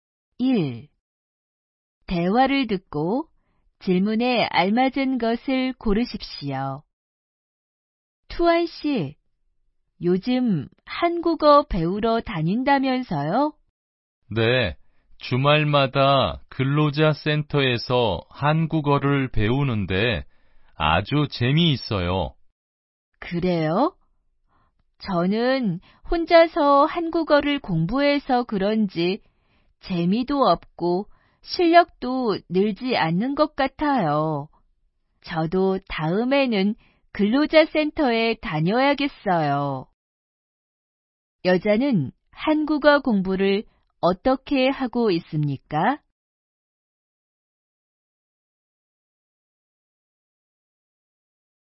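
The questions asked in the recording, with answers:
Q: 여자는 한국어 공부를 어떻게 하고 있습니까?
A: 혼자서 공부하고 있습니다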